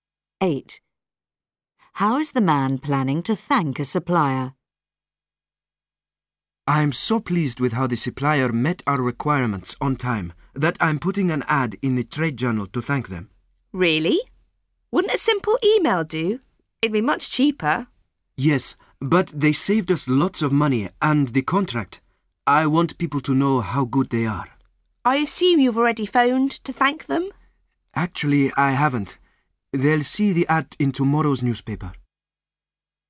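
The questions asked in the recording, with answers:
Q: How is the man planning to thank a supplier?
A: With an advert in the trade journal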